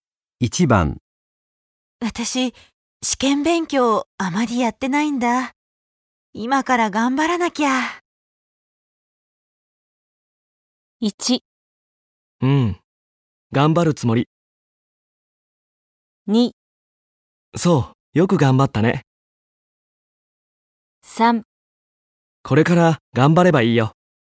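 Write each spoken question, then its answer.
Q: 私、試験勉強あまりやってないんだ。今から頑張らなきゃ。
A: 3: これから頑張ればいいよ。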